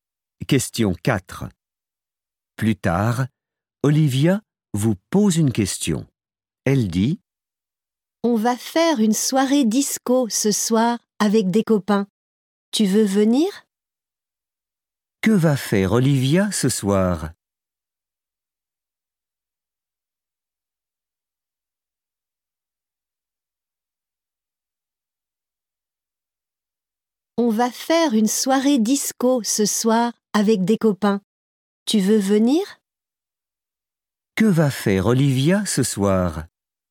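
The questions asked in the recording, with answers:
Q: Que va faire Olivia ce soir ?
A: Une soirée disco avec des copains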